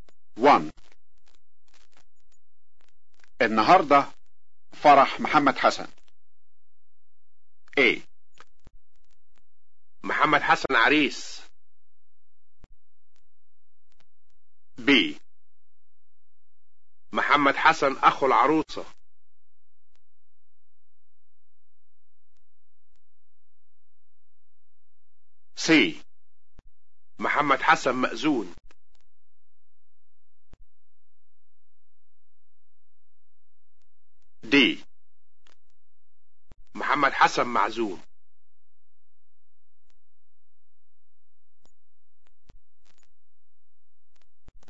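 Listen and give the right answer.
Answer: A: محمد حسن عريس.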